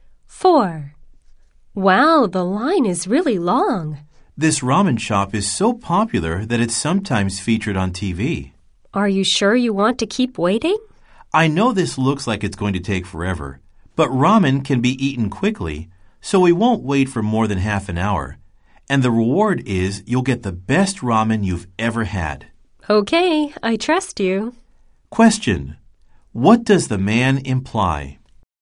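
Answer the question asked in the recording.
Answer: The wait will be under half an hour and the ramen is worth it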